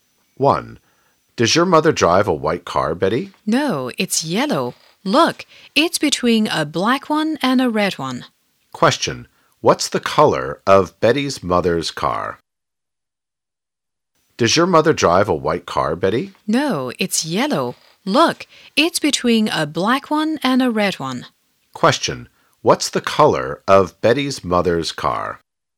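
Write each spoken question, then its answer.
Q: What's the color of Betty's mother's car?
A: Yellow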